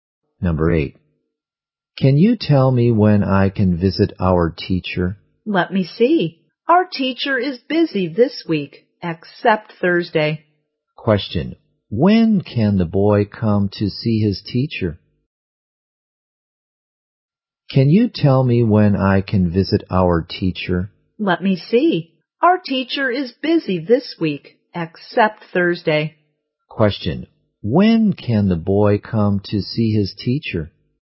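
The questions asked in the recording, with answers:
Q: When can the boy come to see his teacher?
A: On Thursday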